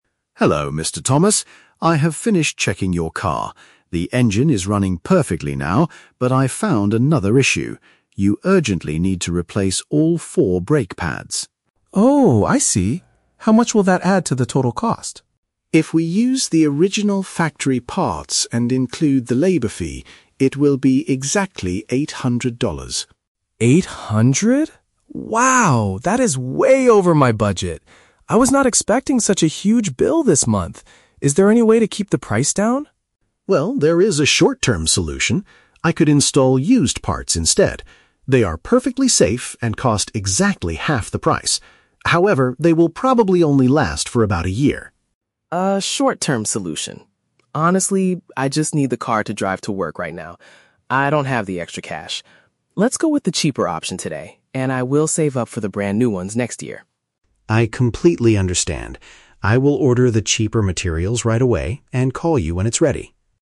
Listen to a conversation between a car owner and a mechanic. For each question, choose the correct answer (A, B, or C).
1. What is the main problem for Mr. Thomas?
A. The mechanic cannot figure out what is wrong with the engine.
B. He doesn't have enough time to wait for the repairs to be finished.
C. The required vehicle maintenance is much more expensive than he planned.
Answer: The required vehicle maintenance is much more expensive than he planned.

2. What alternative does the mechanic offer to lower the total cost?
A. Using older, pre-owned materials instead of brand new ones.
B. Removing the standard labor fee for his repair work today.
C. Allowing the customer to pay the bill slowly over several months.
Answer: Using older, pre-owned materials instead of brand new ones.

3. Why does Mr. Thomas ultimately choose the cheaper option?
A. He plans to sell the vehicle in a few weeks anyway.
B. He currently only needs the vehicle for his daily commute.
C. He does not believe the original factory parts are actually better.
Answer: He currently only needs the vehicle for his daily commute.

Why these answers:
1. Mr. Thomas says, "Eight hundred? Wow, that is way over my budget! I was not expecting such a huge bill" (more expensive than planned). Option (A) is a trap; Mike explicitly says the "engine is running perfectly now." Option (B) is a trap; time is not his concern, money is.
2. Mike suggests a short-term solution: "I could install used parts instead" (older, pre-owned materials). Option (B) is a trap; Mike mentions the "labor fee" as part of the total cost, but doesn't offer to remove it. Option (C) is a common real-world financial solution, but it is not mentioned in this audio.
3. Mr. Thomas decides on the used parts by saying, "Honestly, I just need the car to drive to work right now" (daily commute). Option (A) is a trap; he plans to "save up for the brand new ones next year," so he intends to keep the car. Option (C) is a trap; he doesn't question the quality of the new parts, he just doesn't have the "extra cash" for them.

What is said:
Mike: Hello, Mr. Thomas. I have finished checking your car. The engine is running perfectly now, but I found another issue. You urgently need to replace all four brake pads.
Mr. Thomas: Oh, I see. How much will that add to the total cost?
Mike: If we use the original factory parts and include the labor fee, it will be exactly eight hundred dollars.
Mr. Wow, that is way over my budget! I was not expecting such a huge bill this month. Is there any way to keep the price down?
Mike: Well, there is a short-term solution. I could install used parts instead. They are perfectly safe and cost exactly half the price. However, they will probably only last for about a year.
Mr. Honestly, I just need the car to drive to work right now. I don't have the extra cash. Let's go with the cheaper option today, and I will save up for the brand new ones next year.
Mike: I completely understand. I will order the cheaper materials right away and call you when it's ready.

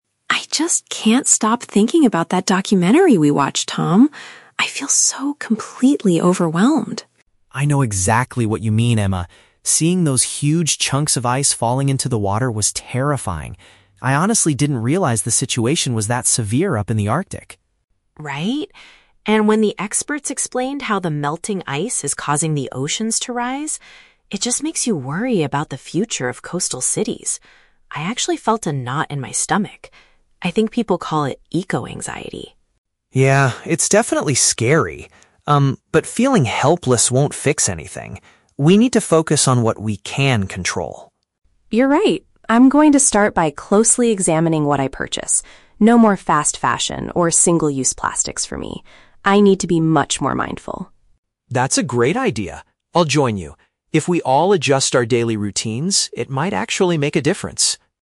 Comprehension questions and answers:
Listen to the conversation between two friends after watching a documentary. Choose the correct answer (A, B, or C) for each question.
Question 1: How does Emma primarily feel after watching the film?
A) She feels highly anxious and stressed about the planet's future.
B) She is confused about why the ocean levels are changing.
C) She is disappointed because the documentary was poorly made.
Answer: She feels highly anxious and stressed about the planet's future.

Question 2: What shocked Tom the most about the documentary?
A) The impact of rising water on large coastal cities.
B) The extreme conditions occurring in the polar regions.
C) The amount of plastic pollution floating in the sea.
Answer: The extreme conditions occurring in the polar regions.

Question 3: What is Emma's plan moving forward?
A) To relocate away from towns located near the coast.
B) To donate her money to an environmental charity.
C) To pay closer attention to her shopping habits.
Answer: To pay closer attention to her shopping habits.

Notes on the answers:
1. Emma uses phrases like "overwhelmed," "felt a knot in my stomach," and "eco-anxiety" to describe her deep worry and stress. (Paraphrasing: highly anxious and stressed = eco-anxiety / overwhelmed).
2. Tom says he didn't realize the situation was "that severe up in the Arctic." (Paraphrasing: extreme conditions = severe situation; polar regions = the Arctic).
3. Emma resolves to change her behavior by "examining what I purchase" and stopping her use of fast fashion and single-use plastics. (Paraphrasing: shopping habits = what I purchase / fast fashion / plastics).

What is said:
Emma: I just can't stop thinking about that documentary we watched, Tom. I feel so completely overwhelmed.
Tom: I know exactly what you mean, Emma. Seeing those huge chunks of ice falling into the water was terrifying. I honestly didn't realize the situation was that severe up in the Arctic.
Emma: Right? And when the experts explained how the melting ice is causing the oceans to rise... it just makes you worry about the future of coastal cities. I actually felt a knot in my stomach. I think people call it eco-anxiety.
Tom: Yeah, it's definitely scary. Um, but feeling helpless won't fix anything. We need to focus on what we can control.
Emma: You're right. I'm going to start by closely examining what I purchase. No more fast fashion or single-use plastics for me. I need to be much more mindful.
Tom: That's a great idea. I'll join you. If we all adjust our daily routines, it might actually make a difference.

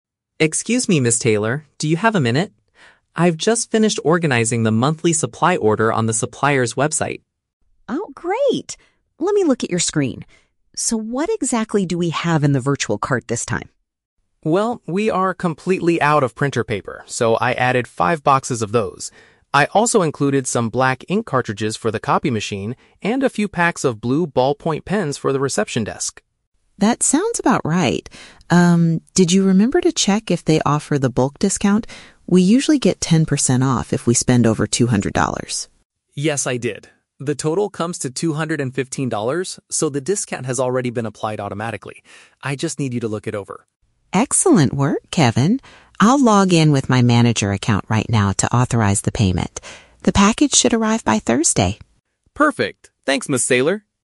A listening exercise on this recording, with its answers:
Listen to a conversation between an administrative assistant and an office manager. Choose the best answer (A, B, or C) for each question.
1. What is Kevin's main purpose for speaking to Ms. Taylor?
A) To complain that the copy machine is completely broken.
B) To ask her to create a new account on the supplier's website.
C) To get her permission to finalize a company purchase.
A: To get her permission to finalize a company purchase.

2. What type of products did Kevin place in the online cart?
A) Materials for printing and writing instruments.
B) Brand new furniture for the office reception area.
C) Cleaning supplies and coffee for the staff.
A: Materials for printing and writing instruments.

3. How does the company qualify for the ten percent discount on this order?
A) By entering a secret promotional code at checkout.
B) By spending a large enough amount of money.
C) By logging in with a special manager account.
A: By spending a large enough amount of money.

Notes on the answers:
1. Kevin shows Ms. Taylor the virtual cart and she agrees to "authorize the payment." Option C paraphrases this as getting "permission to finalize a company purchase."
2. Kevin mentions adding "printer paper," "ink cartridges," and "ballpoint pens." Option A uses synonyms: "Materials for printing" (paper and ink) and "writing instruments" (pens).
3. Ms. Taylor states they get the discount "if we spend over two hundred dollars," and Kevin confirms the total is $215. Option B paraphrases this as "spending a large enough amount of money."

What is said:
Taylor. Do you have a minute? I've just finished organizing the monthly supply order on the supplier's website.
Taylor: Oh, great. Let me look at your screen. So, what exactly do we have in the virtual cart this time?
Kevin: Well, we are completely out of printer paper, so I added five boxes of those. I also included some black ink cartridges for the copy machine and a few packs of blue ballpoint pens for the reception desk.
Taylor: That sounds about right. Um, did you remember to check if they offer the bulk discount? We usually get ten percent off if we spend over two hundred dollars.
Kevin: Yes, I did. The total comes to two hundred and fifteen dollars, so the discount has already been applied automatically. I just need you to look it over.
Taylor: Excellent work, Kevin. I'll log in with my manager account right now to authorize the payment. The package should arrive by Thursday.

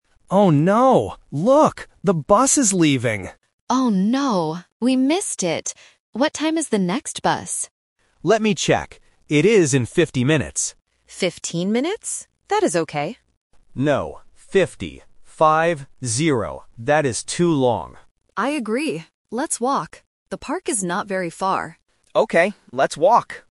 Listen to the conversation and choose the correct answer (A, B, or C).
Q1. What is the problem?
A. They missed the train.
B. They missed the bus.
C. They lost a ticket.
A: They missed the bus.

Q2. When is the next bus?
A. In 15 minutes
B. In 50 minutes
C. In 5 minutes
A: In 50 minutes

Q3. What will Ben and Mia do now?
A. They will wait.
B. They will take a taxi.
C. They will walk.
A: They will walk.

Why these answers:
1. Ben says clearly at the beginning, "The bus is leaving," and Mia says, "We missed it." Option (A) is a distractor related to transport but is not mentioned. Option (C) is a random problem not in the audio.
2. Ben states the next bus is in "fifty minutes" and repeats "Five - zero." Option (A) is a trap because Mia mishears him and says "Fifteen minutes?", but Ben immediately corrects her. Option (C) is a random number distractor.
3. Mia suggests, "Let's walk," and Ben agrees, "Okay, let's walk." Option (A) is a trap because waiting for the bus is mentioned, but Ben says "That is too long," so they reject it. Option (B) is a plausible alternative but is not mentioned.

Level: A1

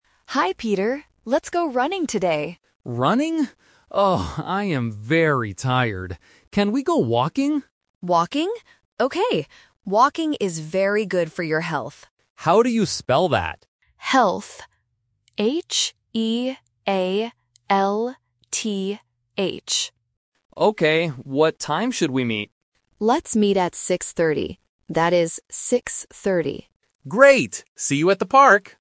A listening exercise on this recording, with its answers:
Listen to the conversation. Circle the correct answer (A, B, or C).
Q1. What does Peter want to do?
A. Go running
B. Go walking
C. Go swimming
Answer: Go walking

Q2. Why do they go walking?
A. Because it is good for health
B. Because they want to see the park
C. Because they are bored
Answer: Because it is good for health

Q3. What time will they meet?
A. 6:13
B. 6:30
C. 7:30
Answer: 6:30

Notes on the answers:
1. Anna suggests "running" first (The Trap), but Peter rejects it because he is tired and asks, "Can we go walking?".
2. Anna clearly states, "Walking is very good for your health" and even spells the word "H-E-A-L-T-H". Options B and C are not mentioned.
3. Anna says "6:30" and repeats it as "six-thirty" (A1 repetition technique). Option A (6:13) is a phonetic trap common in A1 exams (thirteen vs. thirty).

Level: A1

